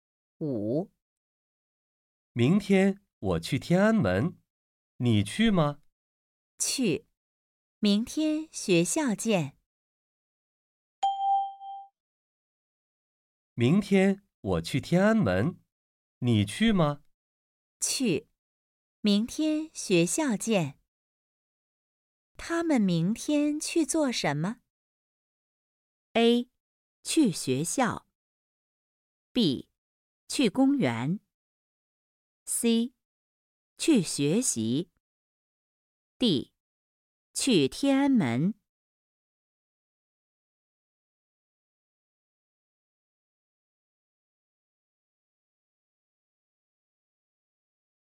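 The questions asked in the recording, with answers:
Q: 他们明天去做什么?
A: D: 去天安门。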